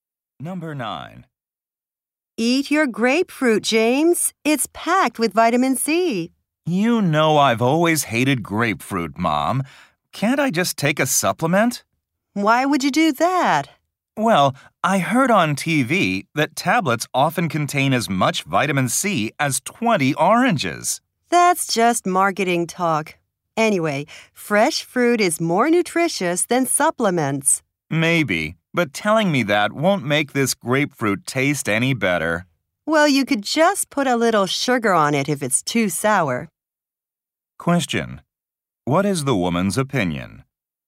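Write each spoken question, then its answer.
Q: What is the woman's opinion?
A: Fresh fruit is more nutritious than supplements.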